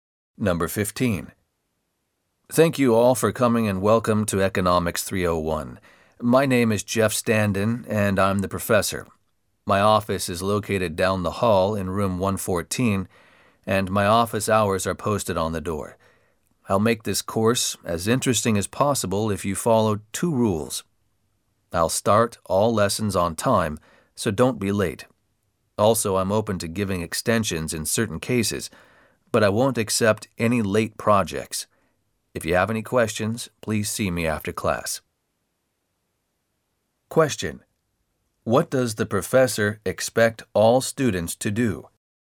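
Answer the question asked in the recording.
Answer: Be on time for class and hand in projects on time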